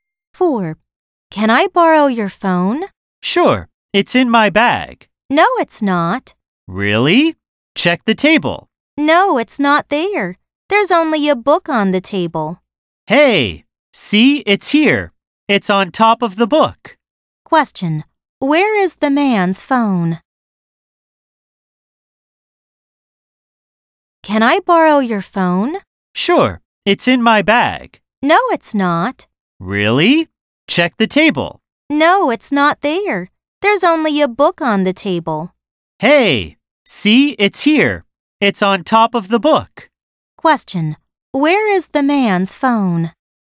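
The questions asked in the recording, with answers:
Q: Where is the man's phone?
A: On top of the book on the table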